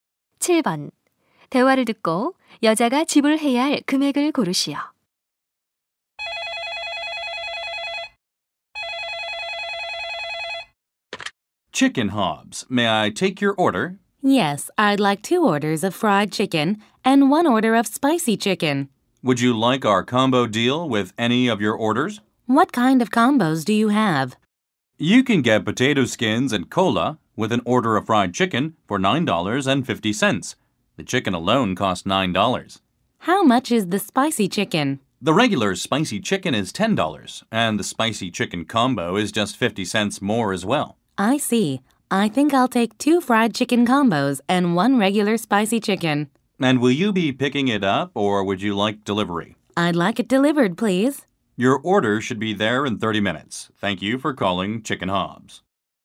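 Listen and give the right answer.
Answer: $29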